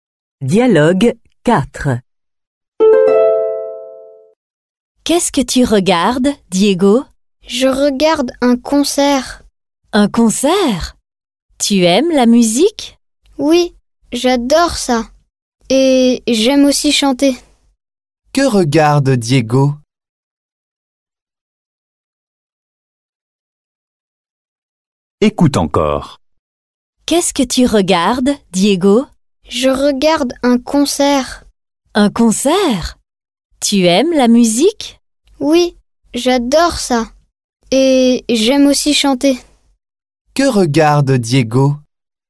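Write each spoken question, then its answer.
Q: Que regarde Diego?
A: un concert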